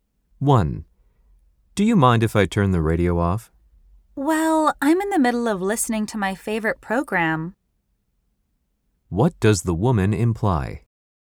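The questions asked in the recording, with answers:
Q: What does the woman imply?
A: She wants the radio left on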